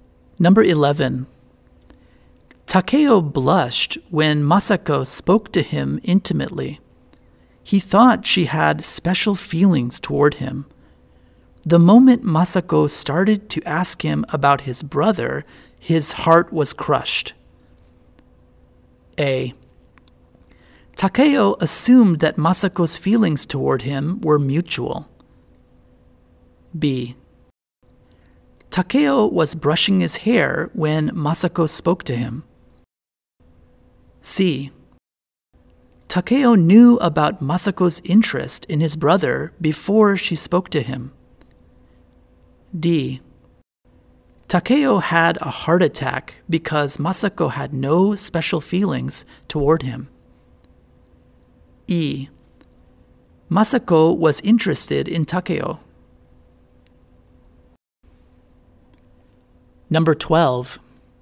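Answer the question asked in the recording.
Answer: A: Takeo assumed that Masako's feelings toward him were mutual.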